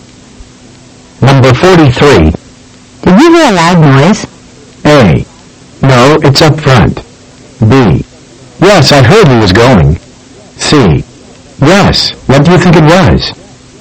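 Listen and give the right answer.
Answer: C: Yes, what do you think it was?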